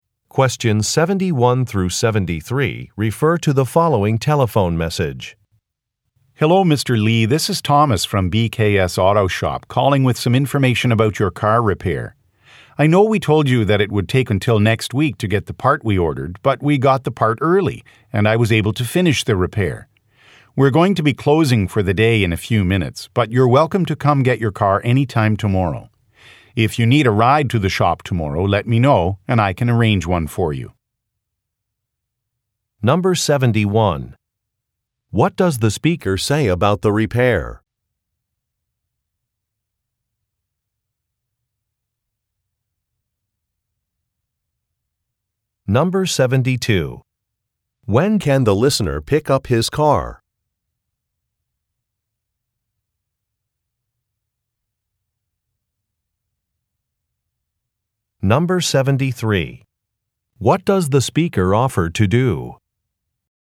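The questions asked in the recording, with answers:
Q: What does the speaker say about the repair?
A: It was finished earlier than expected.

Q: When can the listener pick up his car?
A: Tomorrow

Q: What does the speaker offer to do?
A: Arrange a ride to the shop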